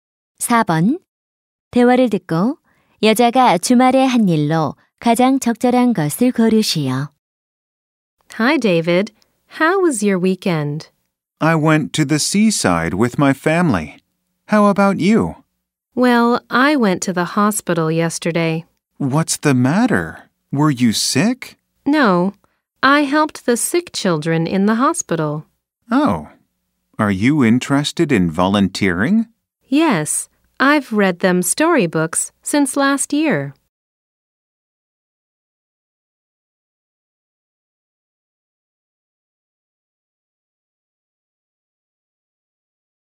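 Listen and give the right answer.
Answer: 병원에서 아픈 아이들을 돕는 봉사활동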